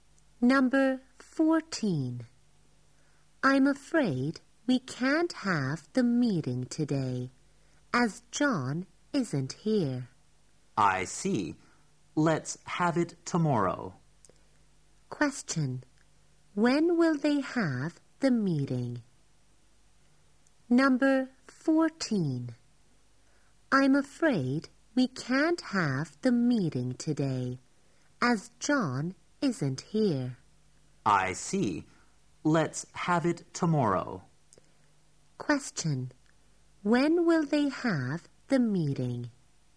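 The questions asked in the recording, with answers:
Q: When will they have the meeting?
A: Tomorrow.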